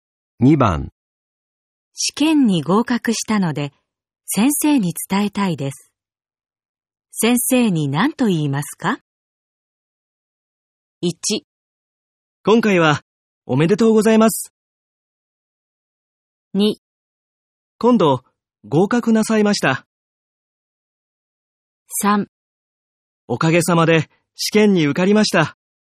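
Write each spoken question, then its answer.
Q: 試験に合格したので、先生に伝えたいです。先生に何と言いますか?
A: 3: おかげさまで、試験に受かりました。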